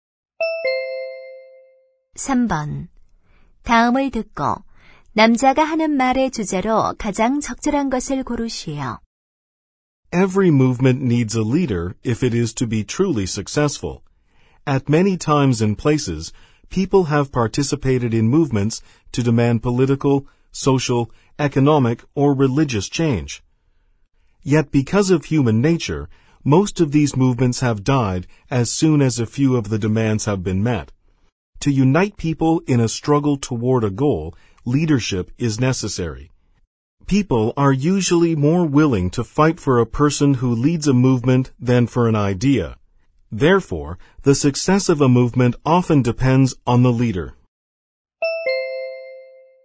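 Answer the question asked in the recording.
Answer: 운동의 성공에 있어 지도자의 중요성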